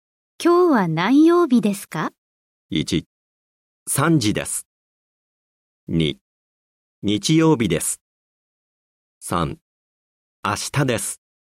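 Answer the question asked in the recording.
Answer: 2: 日曜日です。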